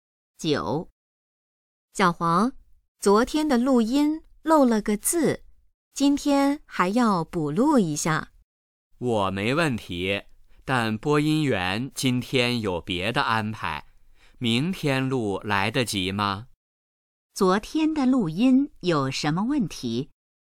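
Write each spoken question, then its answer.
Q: 昨天的录音有什么问题?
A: 漏了个字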